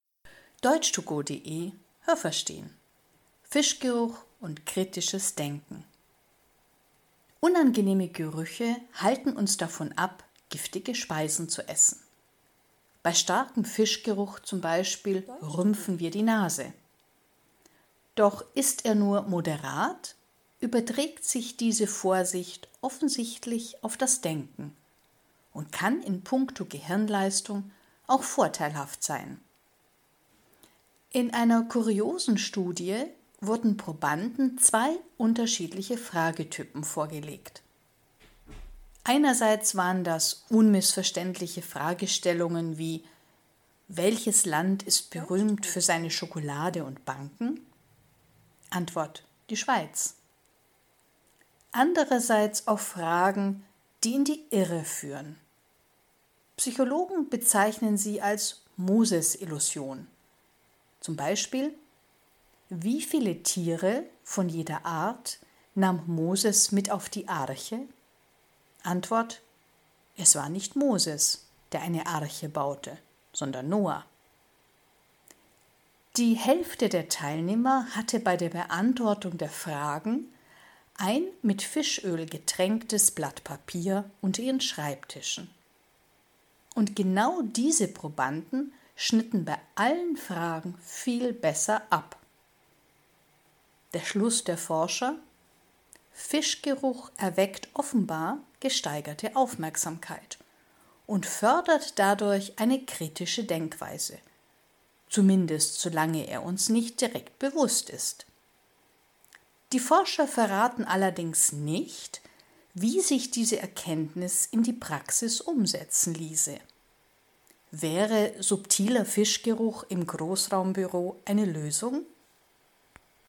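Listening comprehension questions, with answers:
Haben Sie das gehört? Stimmt diese Aussage?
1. Scharfer Fischgeruch schärft das Denken.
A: falsch

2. Die Studienteilnehmer mussten zu zweit eindeutige Fragestellungen beantworten.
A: falsch

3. Als „Moses-Illusion" bezeichnet man Fragen, die einen in eine falsche Richtung lenken.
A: richtig

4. 50 % der Teilnehmer schrieben ihre Antworten auf ein mit Fischöl getränktes Papier.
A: falsch

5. Teilnehmer, die ein mit Fischöl getränktes Papier unter ihrem Schreibtisch hatten, beantworteten die Fragen besser.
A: richtig

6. Fischgeruch fördert eine kritische Denkweise, aber man darf ihn nicht bewusst wahrnehmen.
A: richtig

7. Forscher möchten Großraumbüros mit subtilem Fischgeruch versehen.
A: falsch

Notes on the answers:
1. Das passiert bei einem nur moderaten Geruch.
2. Sie waren nicht zu zweit, sondern jeder musste zwei Fragetypen beantworten.
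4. Das mit Fischöl getränkte Papier war unter ihrem Schreibtisch.
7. Die Forscher machen laut Text keine Vorschläge. Das ist lediglich ein (ironischer) Vorschlag der Autorin.

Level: C (schwer)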